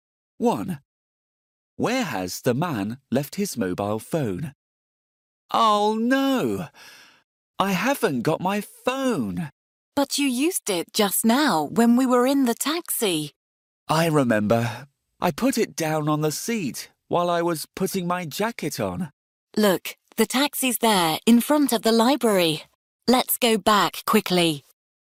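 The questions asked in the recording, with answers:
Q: Where has the man left his mobile phone?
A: On the seat in the taxi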